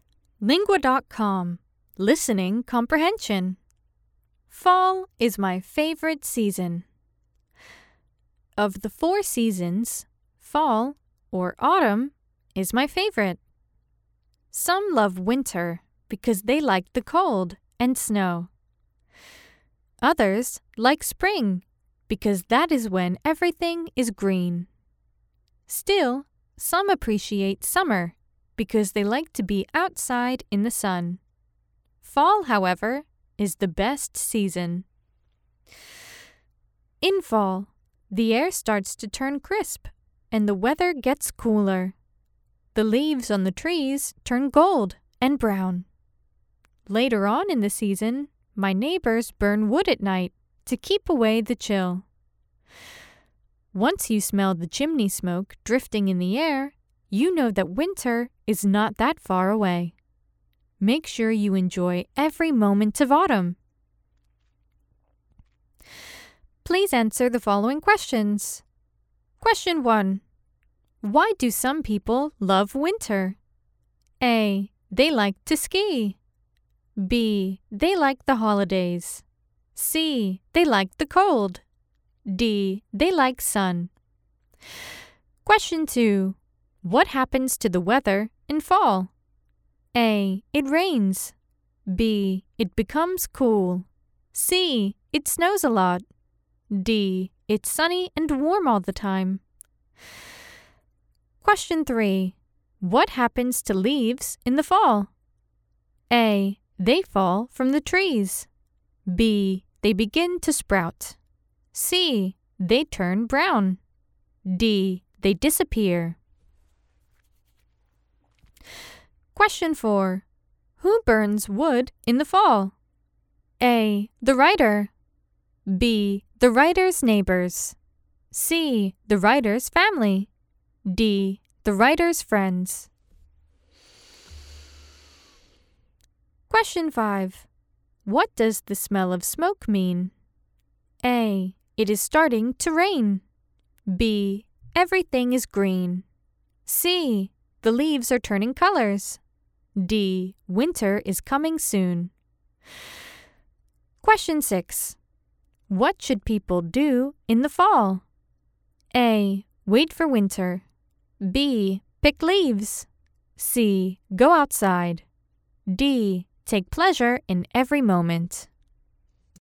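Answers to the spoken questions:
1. C: They like the cold.
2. B: It becomes cool.
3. C: They turn brown.
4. B: The writer's neighbors.
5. D: Winter is coming soon.
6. D: Take pleasure in every moment.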